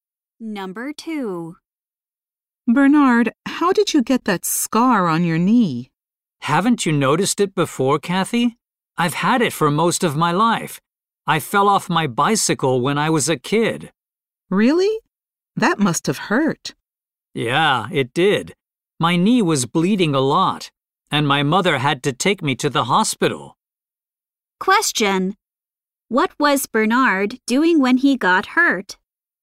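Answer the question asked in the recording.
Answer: Riding his bicycle as a kid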